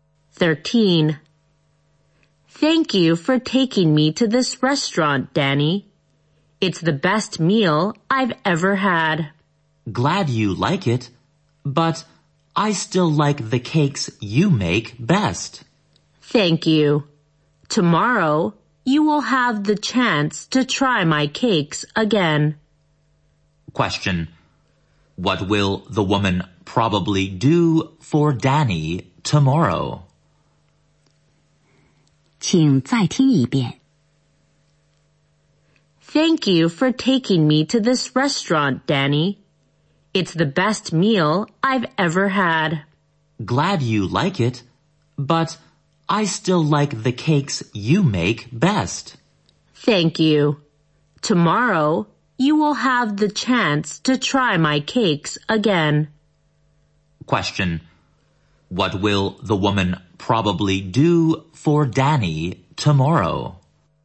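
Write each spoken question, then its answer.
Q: Question. What will the woman probably do for Danny tomorrow?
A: Make cakes for him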